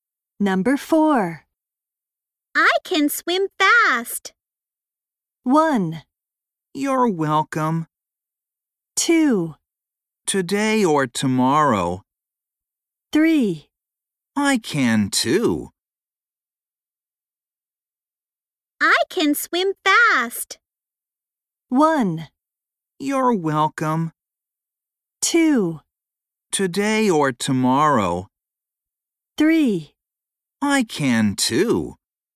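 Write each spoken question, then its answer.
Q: I can swim fast.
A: 3: I can too.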